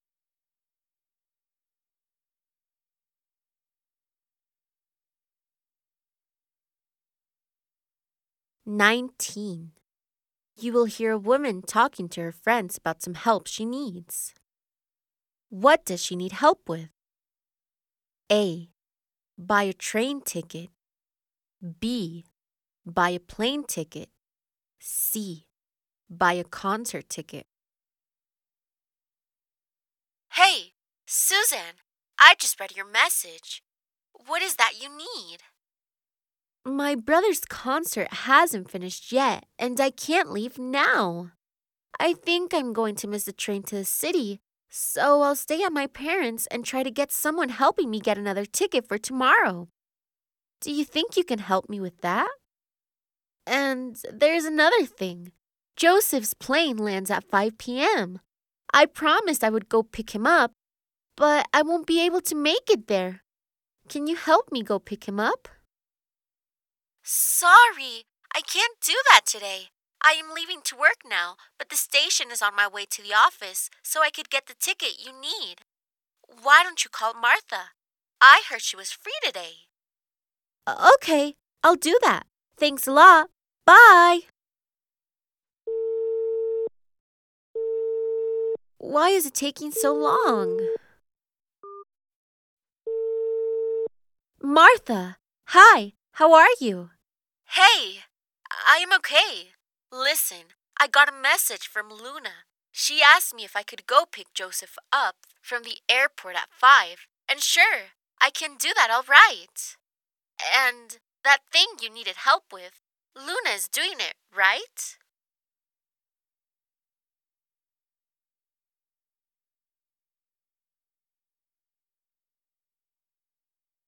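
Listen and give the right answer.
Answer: A: Buy a train ticket.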